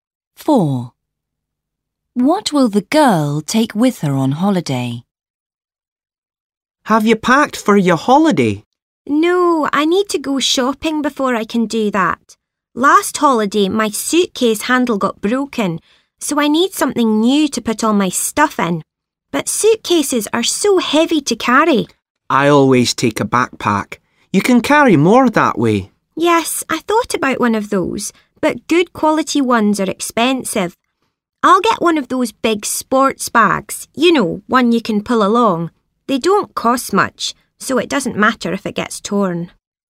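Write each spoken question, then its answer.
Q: What will the girl take with her on holiday?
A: a big sports bag you can pull along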